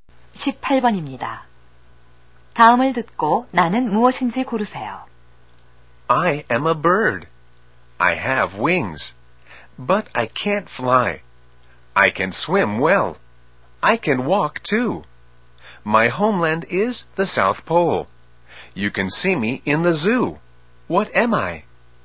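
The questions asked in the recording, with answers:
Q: 다음을 듣고 나는 무엇인지 고르세요.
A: 펭귄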